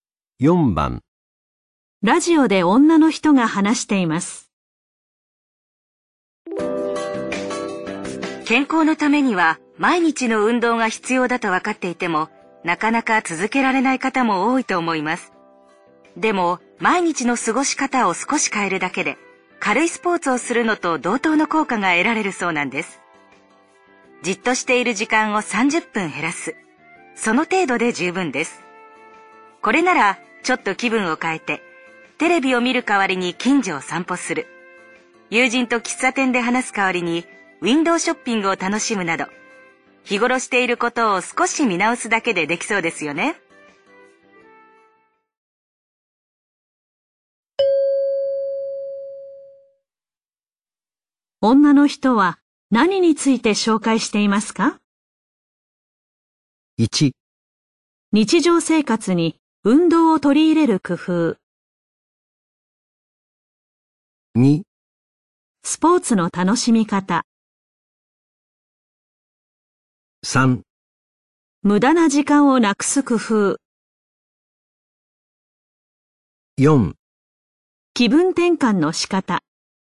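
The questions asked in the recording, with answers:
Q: 女の人は何について紹介していますか?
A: 1: 日常生活に運動を取り入れる工夫。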